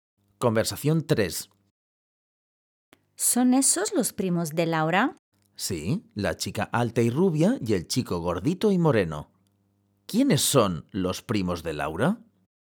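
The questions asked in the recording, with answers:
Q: ¿Quiénes son los primos de Laura?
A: La chica alta y rubia y el chico gordito y moreno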